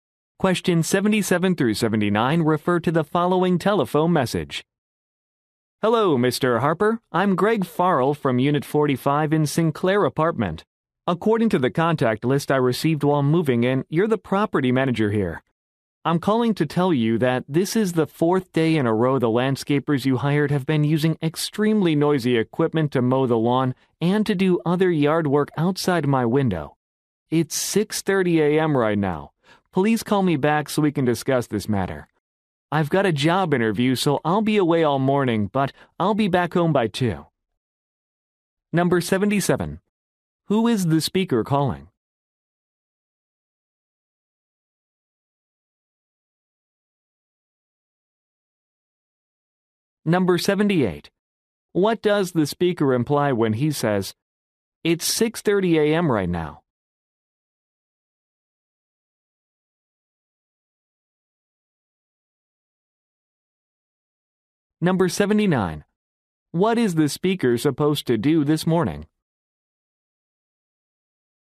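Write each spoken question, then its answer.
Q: Who is the speaker calling?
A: The property manager

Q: What is the speaker supposed to do this morning?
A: Attend a job interview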